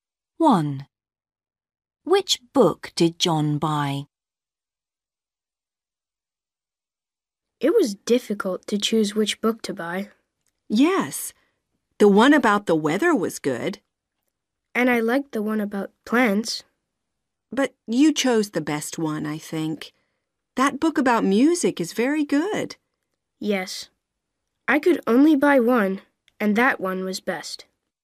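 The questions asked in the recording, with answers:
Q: Which book did John buy?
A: the book about music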